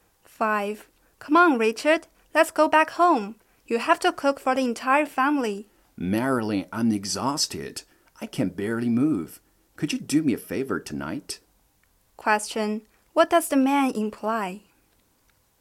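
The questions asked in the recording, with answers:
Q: What does the man imply?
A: He wants the woman to cook for the family tonight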